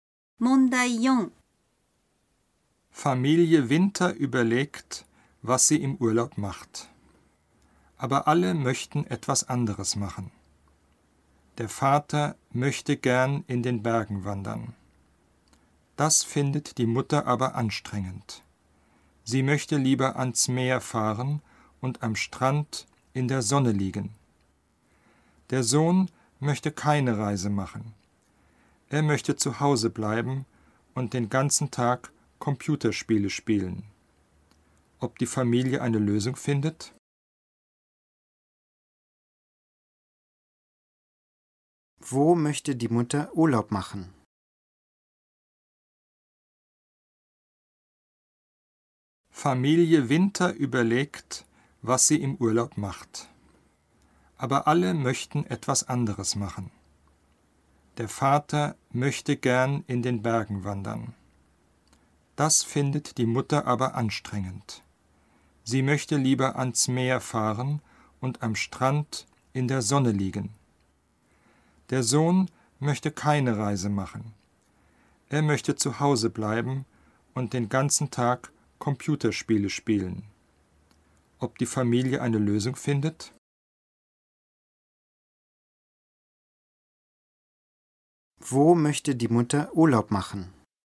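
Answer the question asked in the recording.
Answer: Am Meer, am Strand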